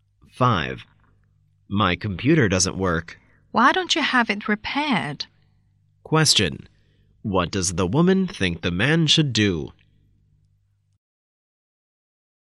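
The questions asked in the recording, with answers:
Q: What does the woman think the man should do?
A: Have his computer repaired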